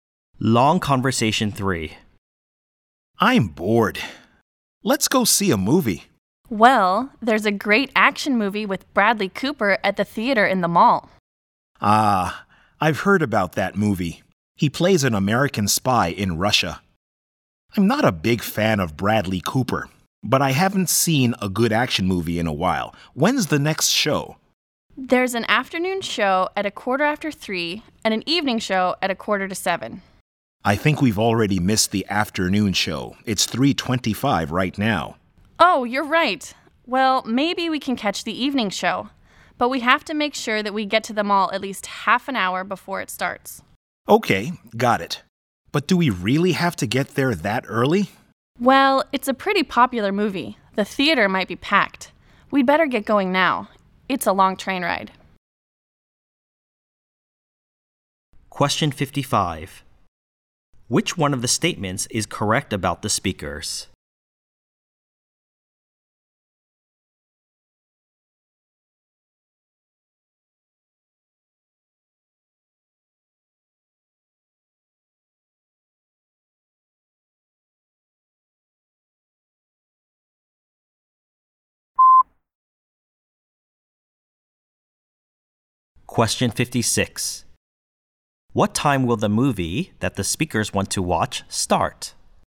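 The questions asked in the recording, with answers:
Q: What time will the movie that the speakers want to watch start?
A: 6:45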